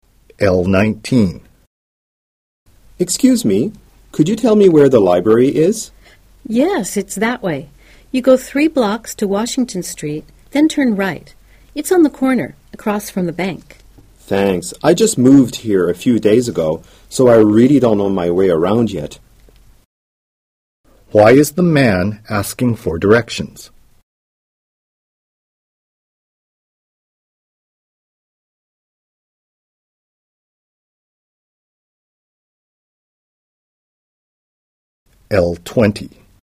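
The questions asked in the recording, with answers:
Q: Why is the man asking for directions?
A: He just moved there and doesn't know his way around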